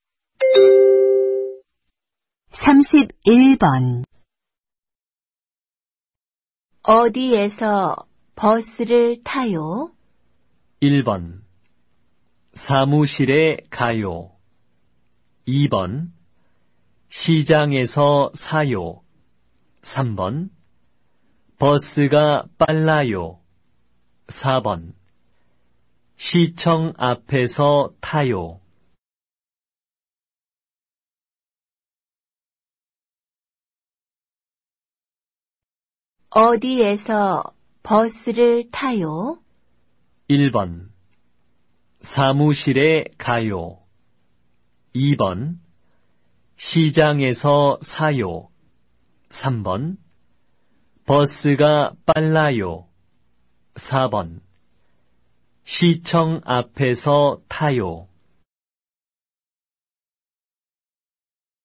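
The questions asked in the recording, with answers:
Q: 어디에서 버스를 타요?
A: 4: 시청 앞에서 타요.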